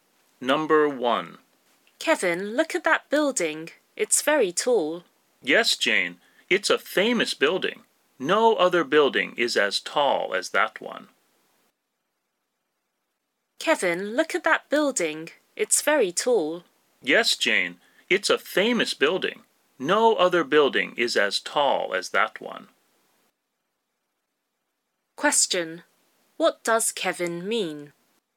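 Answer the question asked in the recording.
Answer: That building is the tallest building.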